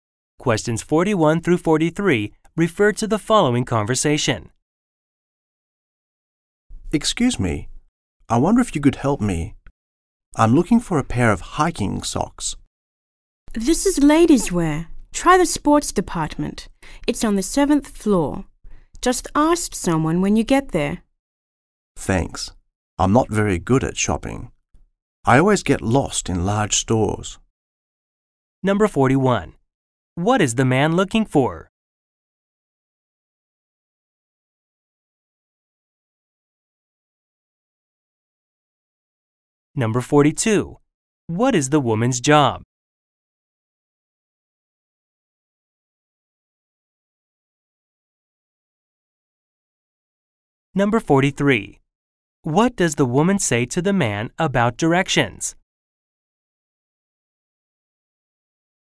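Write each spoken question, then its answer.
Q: What is the man looking for?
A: A pair of hiking socks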